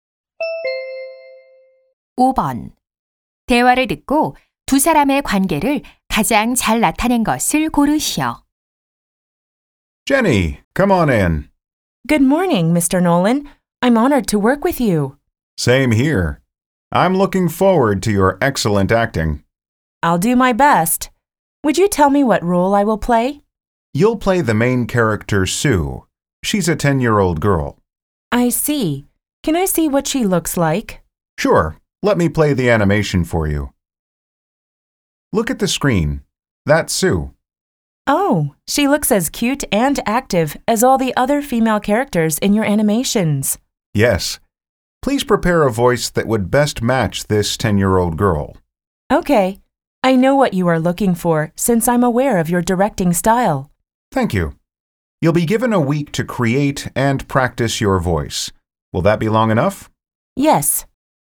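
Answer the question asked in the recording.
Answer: 애니메이션 감독 - 성우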